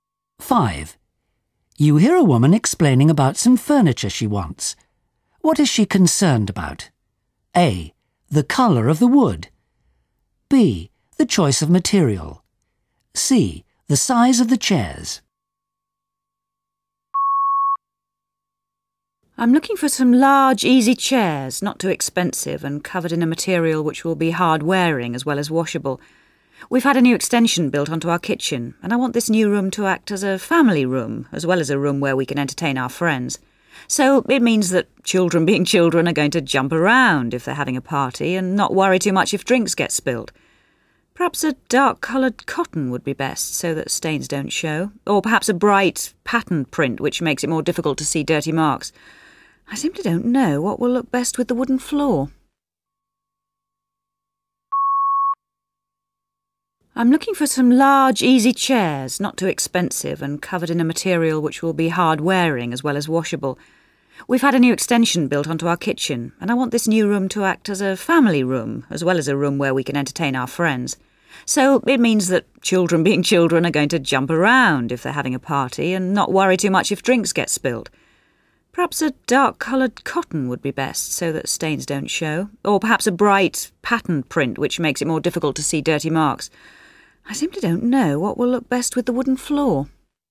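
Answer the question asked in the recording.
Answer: B: The choice of material.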